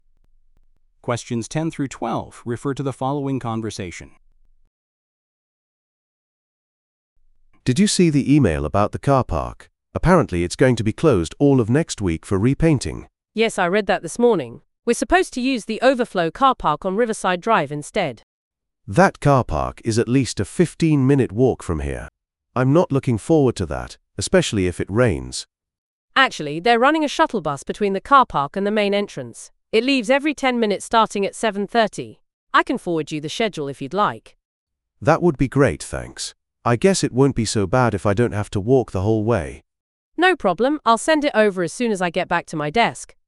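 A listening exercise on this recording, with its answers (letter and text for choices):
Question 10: What is happening to the car park?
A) It is being expanded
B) It is being repainted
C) It is being demolished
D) It is being inspected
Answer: B) It is being repainted

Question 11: What does the man complain about?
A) The cost of parking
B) The lack of security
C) The distance to walk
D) The limited operating hours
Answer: C) The distance to walk

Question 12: What does the woman offer to provide?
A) A shuttle bus timetable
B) A parking permit application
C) A map of the building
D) A list of alternative routes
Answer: A) A shuttle bus timetable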